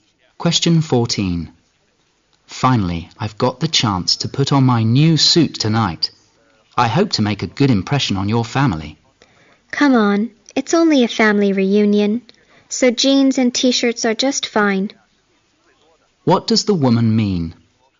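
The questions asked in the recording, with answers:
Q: What does the woman mean?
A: He doesn't need to dress formally; jeans and T-shirts are fine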